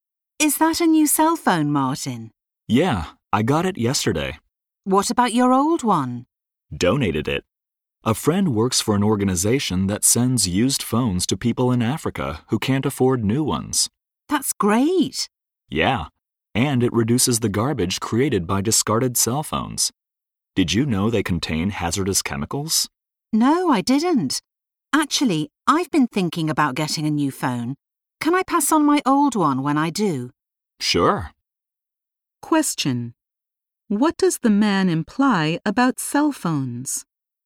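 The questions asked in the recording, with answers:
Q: What does the man imply about cell phones?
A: Discarded cell phones contain hazardous chemicals and harm the environment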